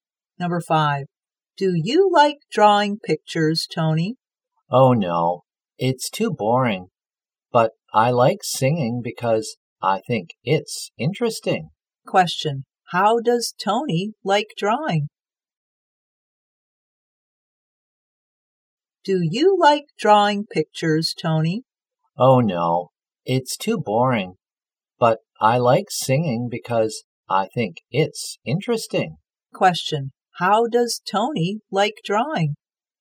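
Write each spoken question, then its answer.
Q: How does Tony like drawing?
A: He thinks it's boring.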